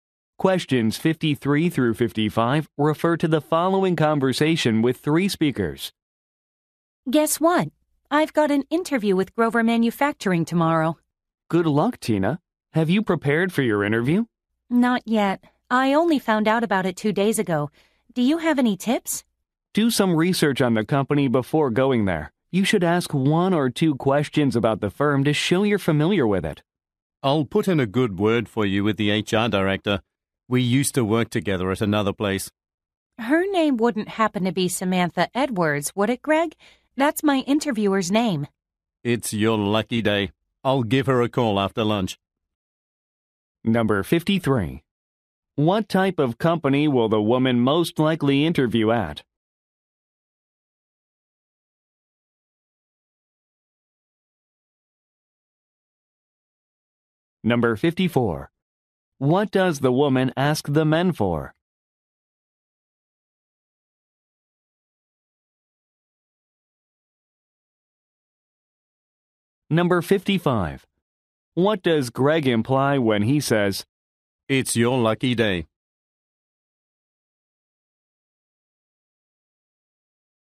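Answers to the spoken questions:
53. A manufacturing company
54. Tips for her interview
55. He knows her interviewer and can recommend her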